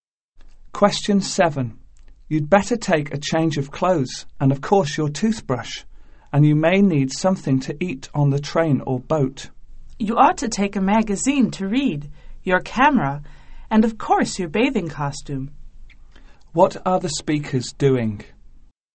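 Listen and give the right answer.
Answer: Packing for a trip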